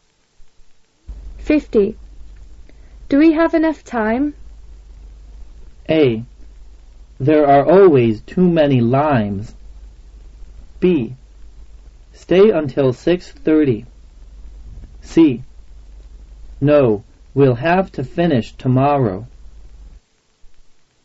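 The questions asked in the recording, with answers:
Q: Do we have enough time?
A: C: No, we'll have to finish tomorrow.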